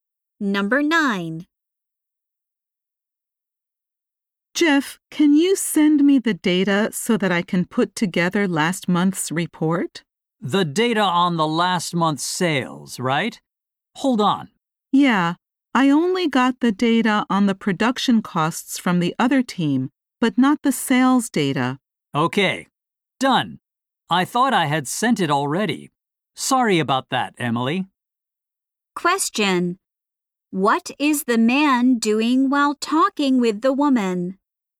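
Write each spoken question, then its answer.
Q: What is the man doing while talking with the woman?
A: Sending her the sales data.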